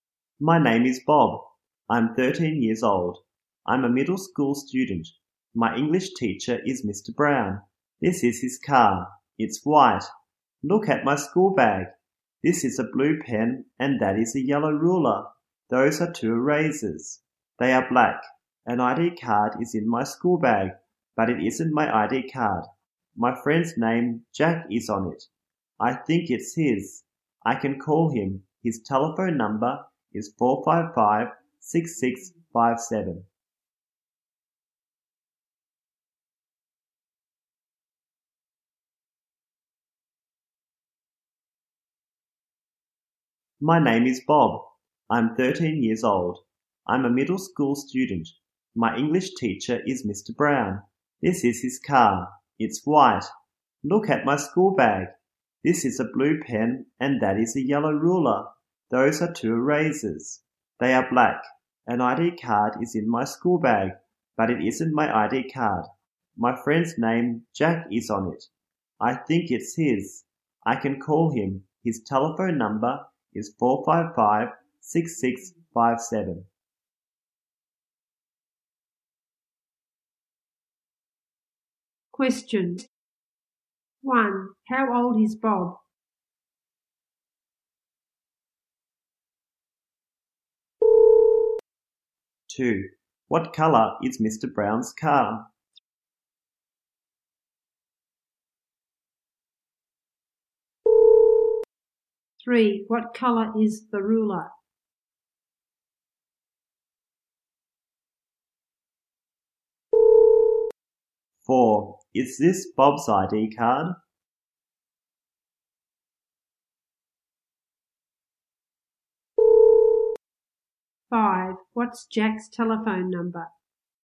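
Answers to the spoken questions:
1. 13 years old
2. White
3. Yellow
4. No, it isn't. It's Jack's.
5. 455-6657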